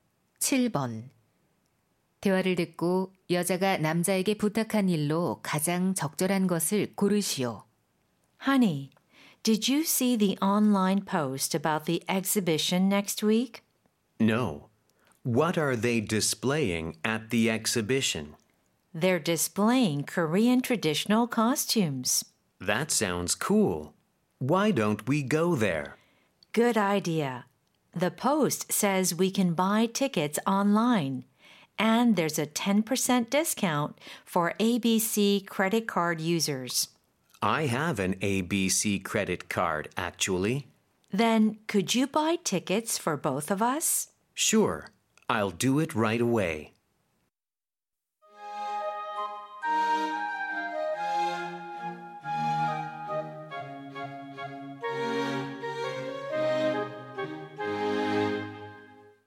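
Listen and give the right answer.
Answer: 전시회 표 두 장 구매하기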